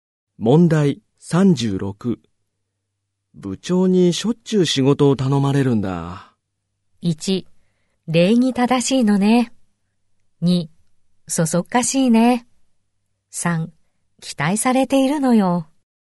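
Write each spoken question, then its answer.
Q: 部長にしょっちゅう仕事を頼まれるんだ。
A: 3: 期待されているのよ。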